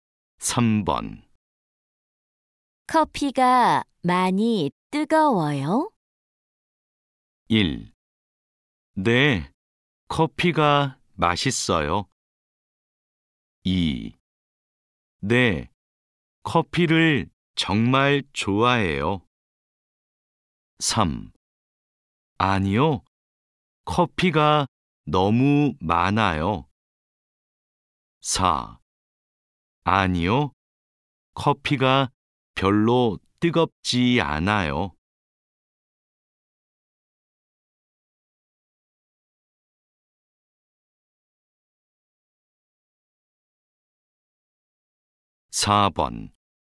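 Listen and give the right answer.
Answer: 4: 아니요, 커피가 별로 뜨겁지 않아요.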